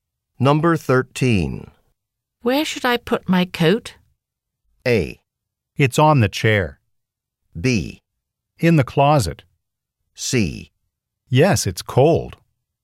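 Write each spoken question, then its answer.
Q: Where should I put my coat?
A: B: In the closet.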